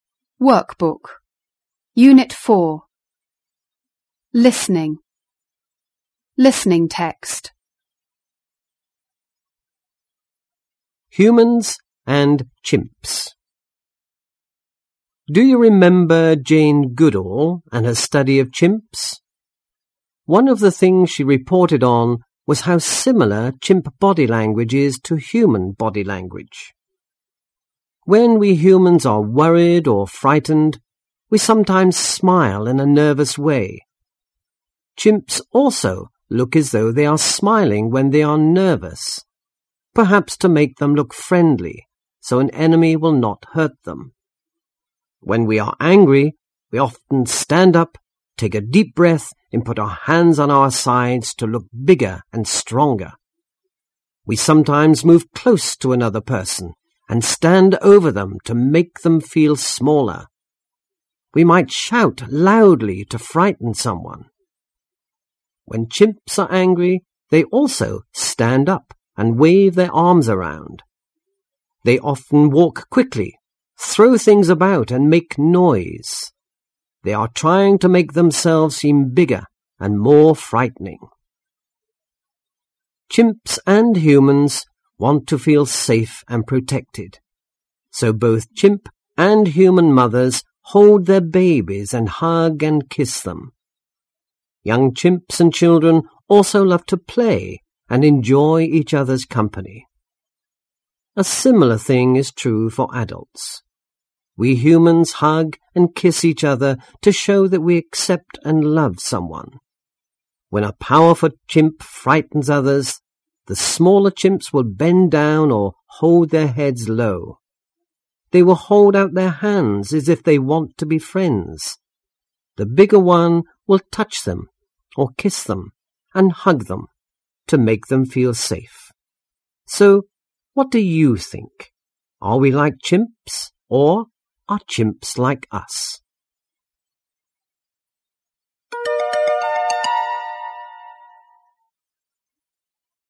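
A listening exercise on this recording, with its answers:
3.Listen to the tape again and answer the questions. Use your own ideas as well as the information on the tape.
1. Why do both humans and chimps smile when they are nervous?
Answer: To look friendly so that an enemy will not hurt them.

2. What things do both humans and chimps do to make themselves look dangerous and frightening?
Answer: They stand up to look bigger; humans shout, chimps wave their arms, throw things and make noise.

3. What do both humans and chimps do to make their babies feel safe?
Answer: They hold their babies and hug and kiss them.

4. How do bigger chimps make the small ones feel safe? Do humans do things like this?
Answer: They touch, kiss and hug them; yes, humans hug and kiss too.

2. Read these sentences and listen the tape. Decide whether they are true or false. Then tick the correct boxes.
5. Chimps and humans have the same body language.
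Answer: False

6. Humans always shout when they feel angry.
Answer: False

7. Both chimps and humans want to feel safe and protected.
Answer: True

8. We often show affection when we like someone.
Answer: True

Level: 高中英语必修四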